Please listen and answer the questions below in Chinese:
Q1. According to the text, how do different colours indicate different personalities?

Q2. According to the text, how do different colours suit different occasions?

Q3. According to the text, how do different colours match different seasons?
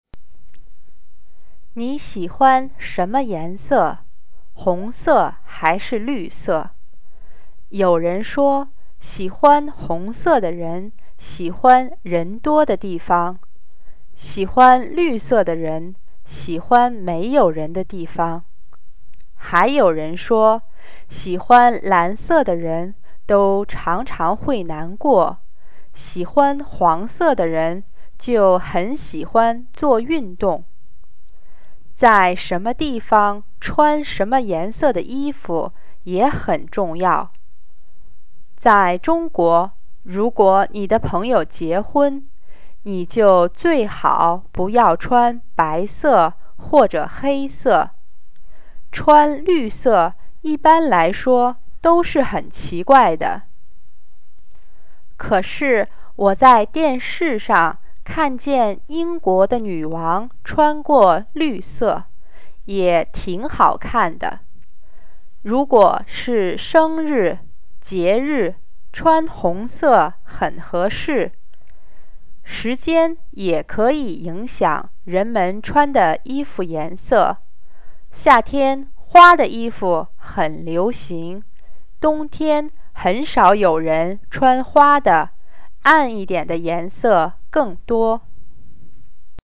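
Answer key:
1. 喜欢红色的人喜欢人多的地方,喜欢绿色的人喜欢没有人的地方;喜欢蓝色的人常常会难过,喜欢黄色的人很喜欢做运动。
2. 在中国朋友结婚最好不要穿白色或者黑色;穿绿色一般很奇怪;节日、生日穿红色很合适。
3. 夏天花的衣服很流行,冬天很少有人穿花的,暗一点儿的颜色更多。

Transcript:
你喜欢什么颜色?红色还是绿色?有人说喜欢红色的人喜欢人多的地方,喜欢绿色的人喜欢没有人的地方。还有人说喜欢蓝色的人都常常会难过,喜欢黄色的人就很喜欢做运动。在什么地方穿什么颜色的衣服也很重要,在中国,如果你的朋友结婚,你就最好不要穿白色或者黑色。穿绿色一般来说都是很奇怪的,可是我在电视上看见英国的女王穿过绿色,也挺好看的。如果是节日、生日,穿红色很合适。时间也可以影响人们穿的衣服颜色,夏天花的衣服很流行,冬天很少有人穿花的,暗一点儿的颜色更多。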